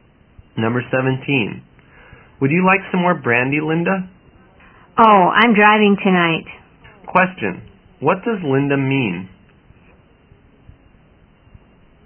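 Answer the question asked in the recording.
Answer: She doesn't want more brandy because she is driving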